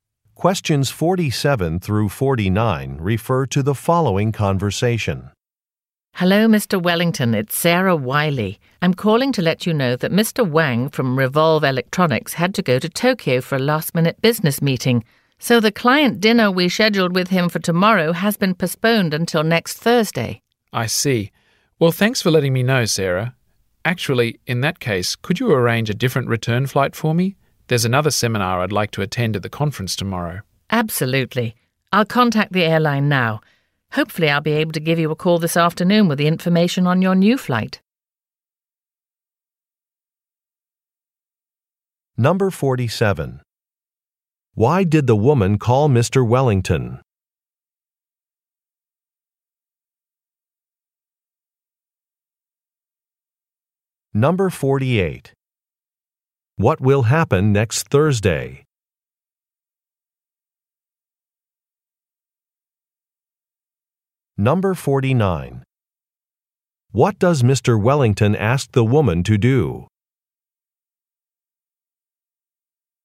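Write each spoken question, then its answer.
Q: Why did the woman call Mr.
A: To tell him the client dinner with Mr. Wang has been postponed

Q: What will happen next Thursday?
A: The client dinner with Mr. Wang

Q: What does Mr. Wellington ask the woman to do?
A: Arrange a different return flight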